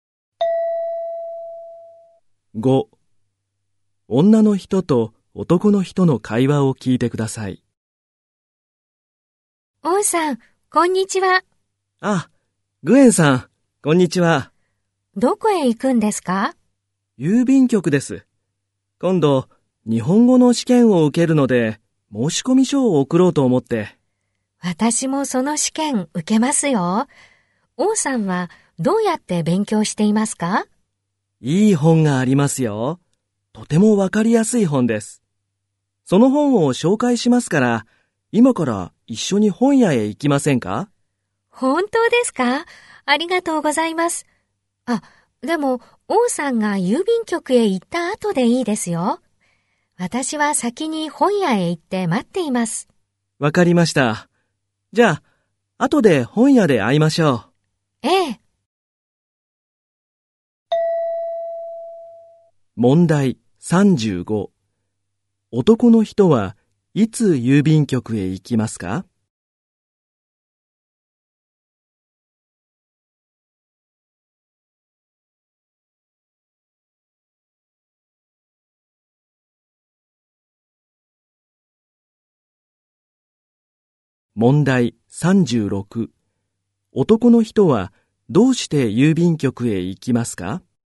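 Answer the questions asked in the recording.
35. 今(本屋へ行く前)
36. 日本語の試験の申し込み書を送るため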